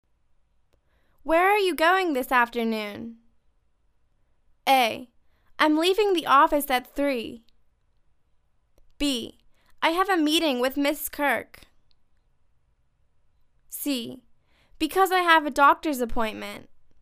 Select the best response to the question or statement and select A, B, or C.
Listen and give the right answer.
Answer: I have a meeting with Ms. Kirk.